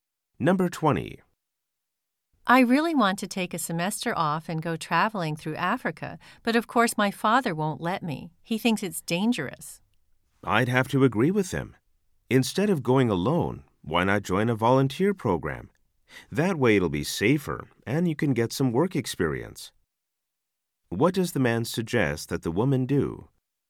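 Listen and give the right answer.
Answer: Join a volunteer program instead of traveling alone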